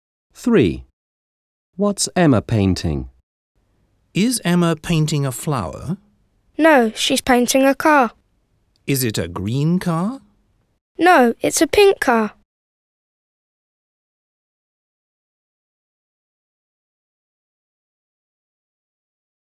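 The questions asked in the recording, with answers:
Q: What's Emma painting?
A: a pink car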